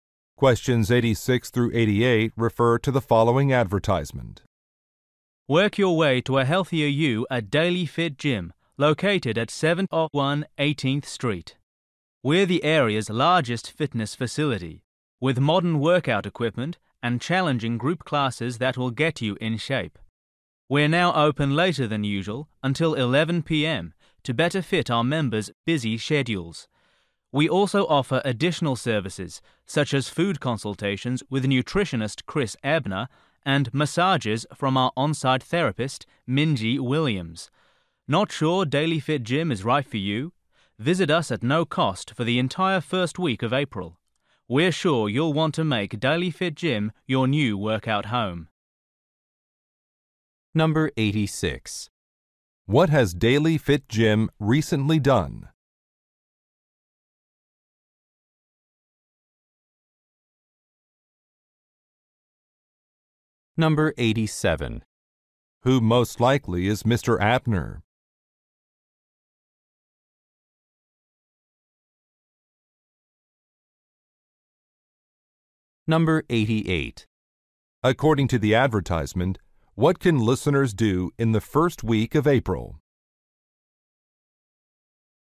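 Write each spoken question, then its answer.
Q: What has Daily Fit Gym recently done?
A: Extended its hours

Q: Who most likely is Mr. Ebner?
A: A nutritionist

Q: According to the advertisement, what can listeners do in the first week of April?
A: Use the gym for free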